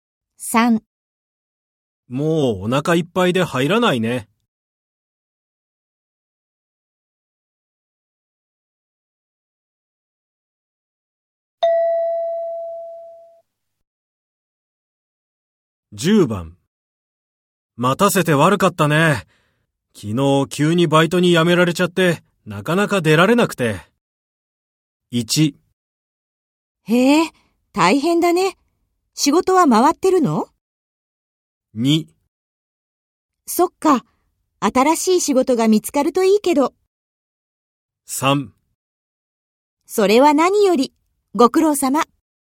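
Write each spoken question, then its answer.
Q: 待たせて悪かったね。昨日急にバイトに辞められちゃって、なかなか出られなくて。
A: 1: へえ、大変だね。仕事は回ってるの?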